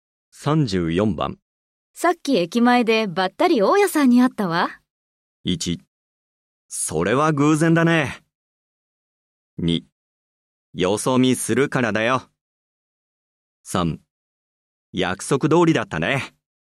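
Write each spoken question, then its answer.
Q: さっき駅前でばったり大家さんに会ったわ。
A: 1: それは偶然だね。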